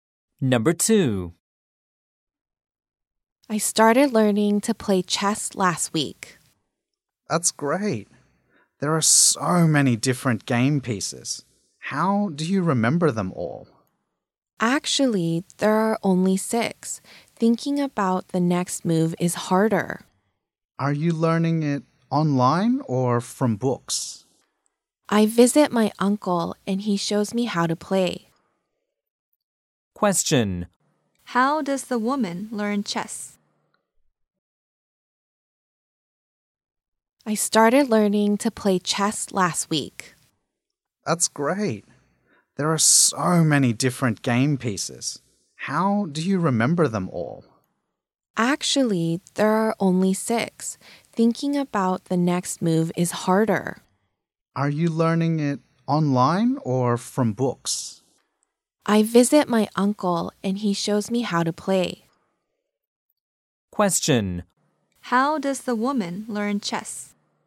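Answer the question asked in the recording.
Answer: Her uncle shows her how to play.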